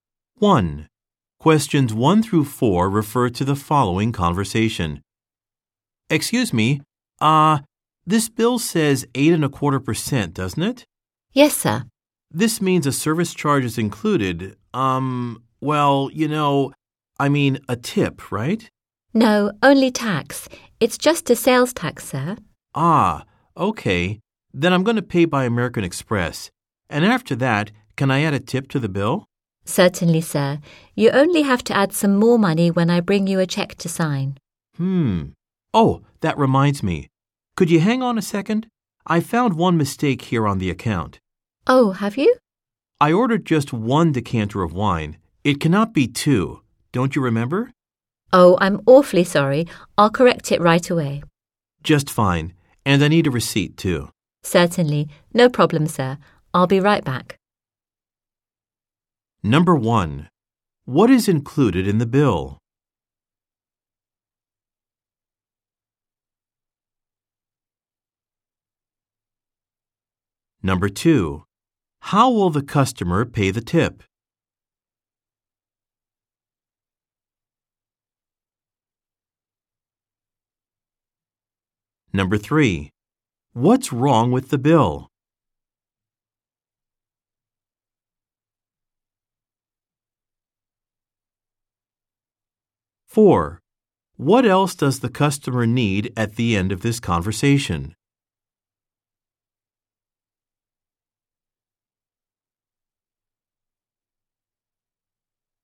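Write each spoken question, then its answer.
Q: What is included in the bill?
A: Only sales tax (8.25%), not a tip

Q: How will the customer pay the tip?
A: By adding it when he signs the American Express check

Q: What's wrong with the bill?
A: It charges for two decanters of wine instead of one

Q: What else does the customer need at the end of this conversation?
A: A receipt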